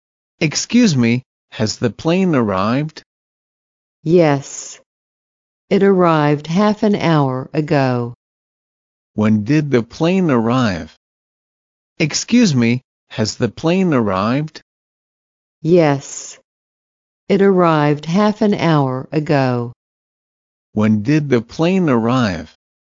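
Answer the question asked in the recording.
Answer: Half an hour ago.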